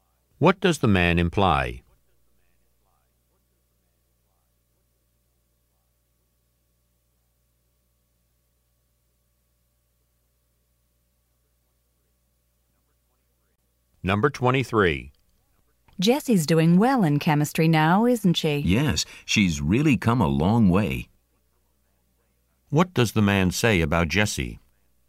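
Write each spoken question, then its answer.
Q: What does the man say about Jessie?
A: She has improved a lot in chemistry.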